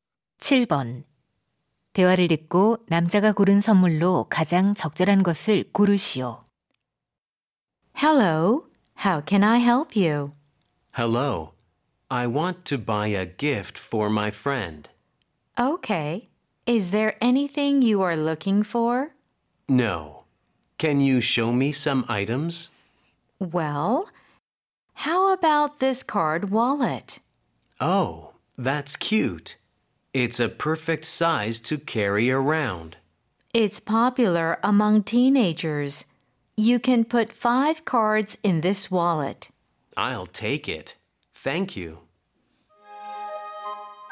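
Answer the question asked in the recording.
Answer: 카드 지갑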